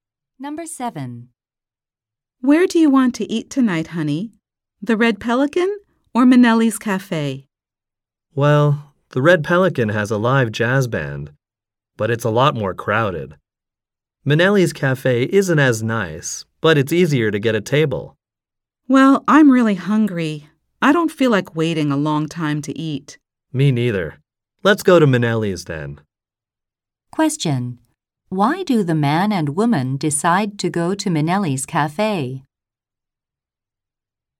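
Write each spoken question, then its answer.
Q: Why do the man and woman decide to go to Minelli's Cafe?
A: It's easier to get a table, so they won't wait long.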